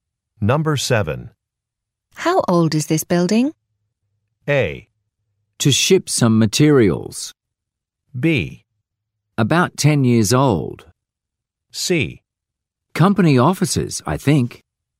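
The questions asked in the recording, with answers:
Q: How old is this building?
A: B: About 10 years old.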